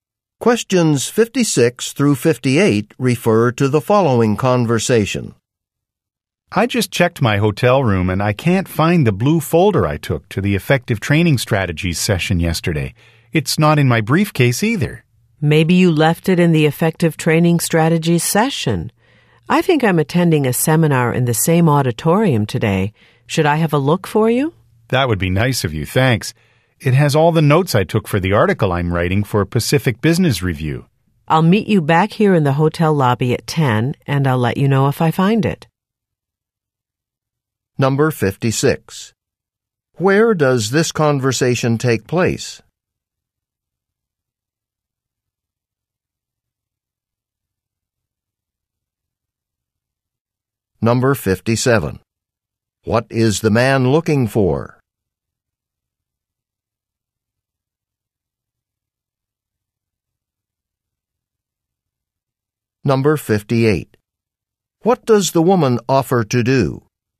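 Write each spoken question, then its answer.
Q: Where does this conversation take place?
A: In a hotel

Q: What is the man looking for?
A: A blue folder

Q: What does the woman offer to do?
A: Look for the folder in the auditorium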